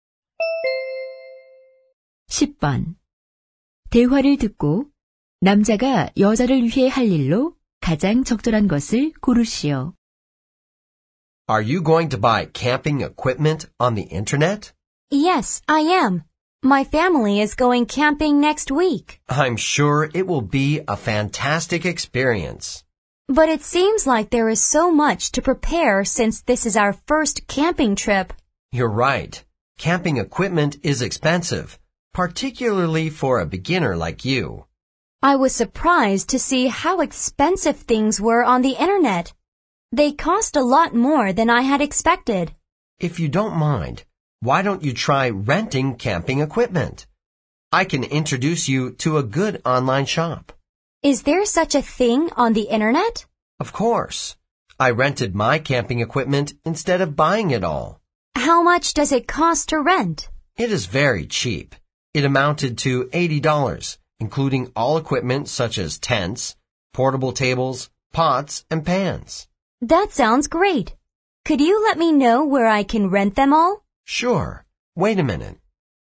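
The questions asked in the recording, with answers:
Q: 대화를 듣고 남자가 여자를 위해 할 일로 가장 적절한 것을 고르시오.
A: 캠핑 장비 대여 온라인 쇼핑몰 알려주기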